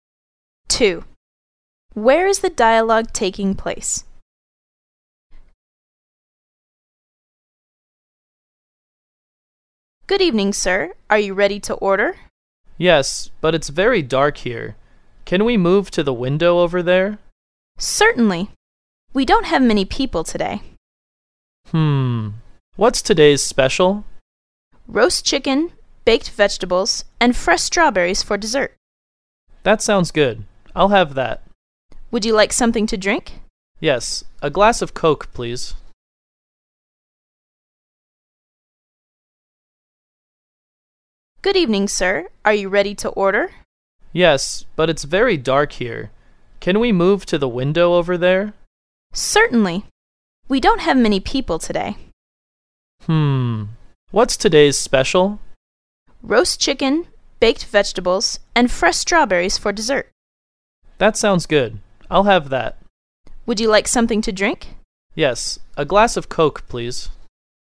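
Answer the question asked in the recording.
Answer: In a restaurant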